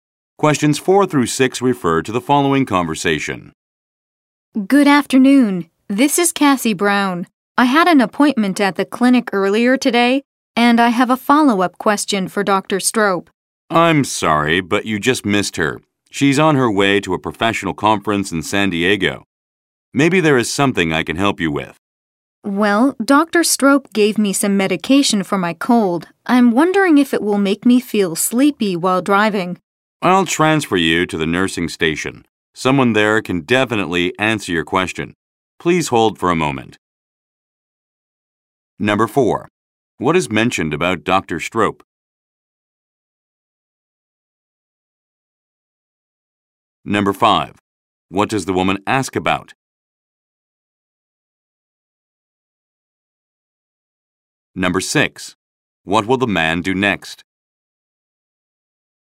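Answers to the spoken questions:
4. She is going to a professional conference in San Diego.
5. Whether her cold medication will make her sleepy while driving.
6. Transfer her call to the nursing station.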